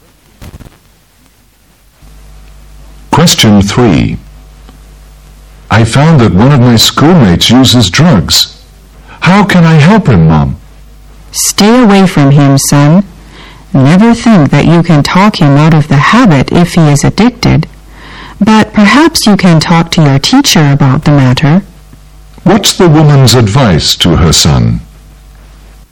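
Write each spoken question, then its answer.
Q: What's the woman's advice to her son?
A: Stay away from him and talk to the teacher.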